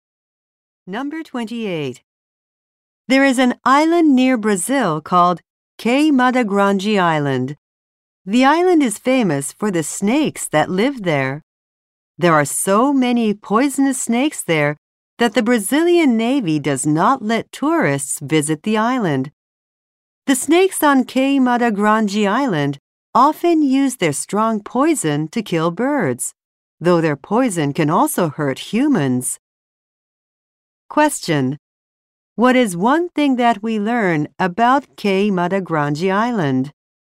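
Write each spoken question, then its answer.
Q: What is one thing that we learn about Cay Mata Grande Island?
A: Tourists are not allowed to visit it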